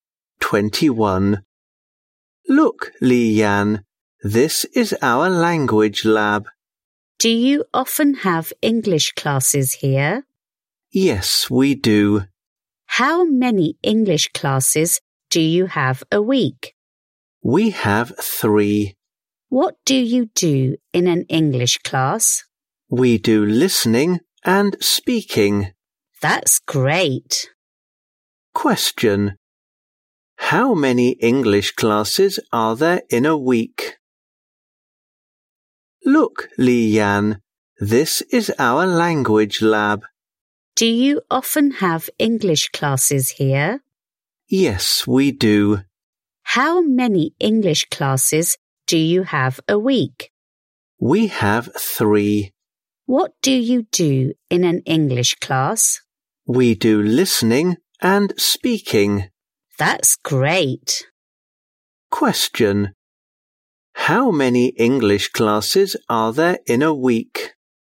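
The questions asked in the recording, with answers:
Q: Question. How many English classes are there in a week?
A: Three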